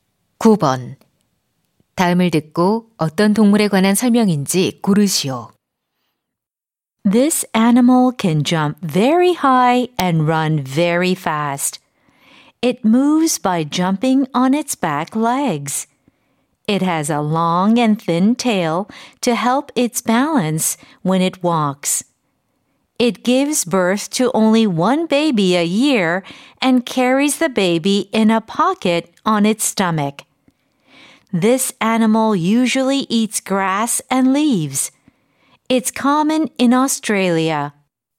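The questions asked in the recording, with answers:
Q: 다음을 듣고 어떤 동물에 관한 설명인지 고르시오.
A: 캥거루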